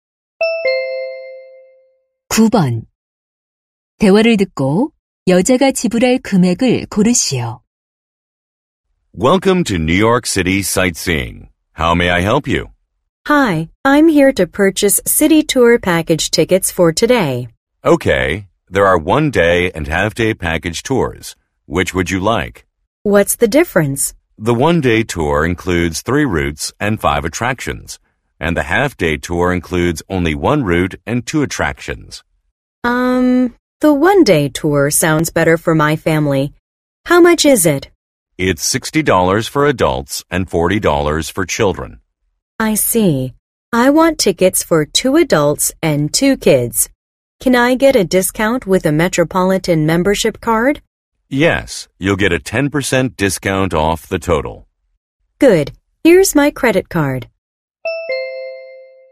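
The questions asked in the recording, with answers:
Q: 대화를 듣고 여자가 지불할 금액을 고르시오.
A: $180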